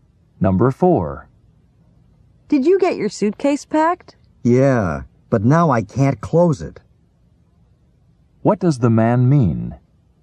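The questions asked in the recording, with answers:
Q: What does the man mean?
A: He can't close his suitcase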